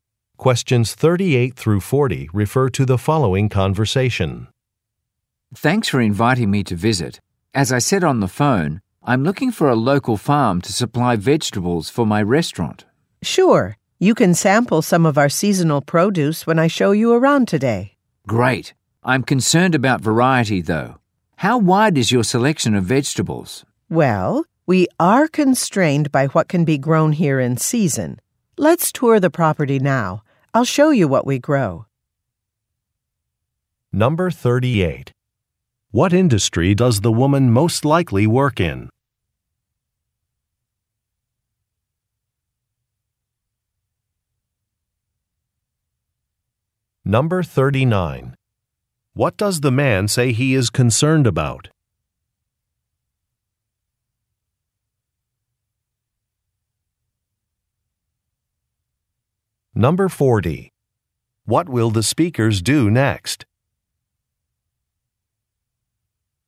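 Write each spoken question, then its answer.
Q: What industry does the woman most likely work in?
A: Agriculture (farming)

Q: What does the man say he is concerned about?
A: The variety of vegetables

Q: What will the speakers do next?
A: Tour the farm property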